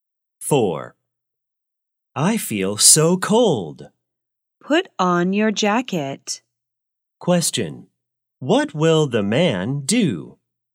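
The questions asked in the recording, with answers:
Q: What will the man do?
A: Put on his jacket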